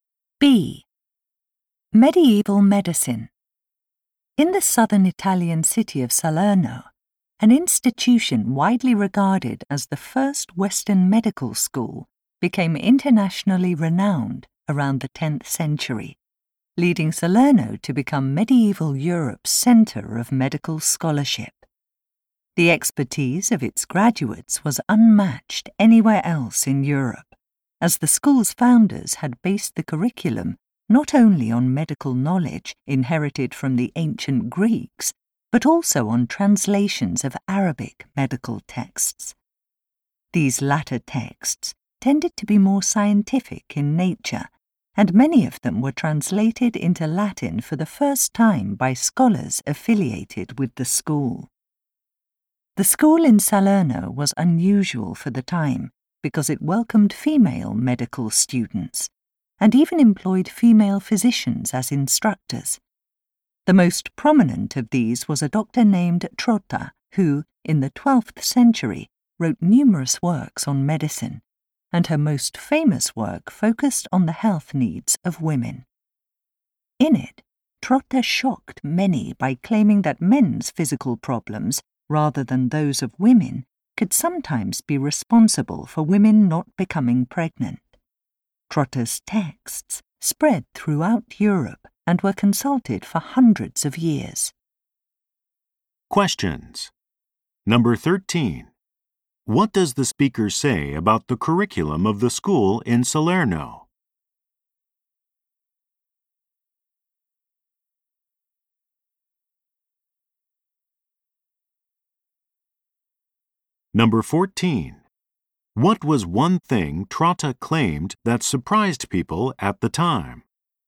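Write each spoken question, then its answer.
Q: What does the speaker say about the curriculum of the school in Salerno?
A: It was based on ancient Greek medical knowledge and on translations of Arabic medical texts.

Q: What was one thing Trotta claimed that surprised people at the time?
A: That men's physical problems could sometimes be why women did not become pregnant.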